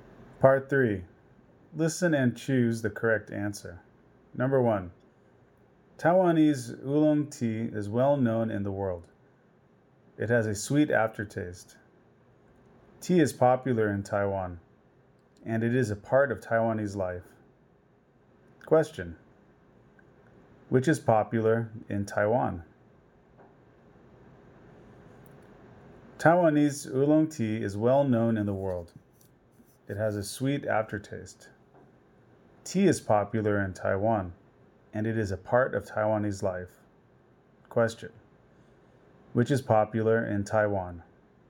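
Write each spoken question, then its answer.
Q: Question, which is popular in Taiwan?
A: Tea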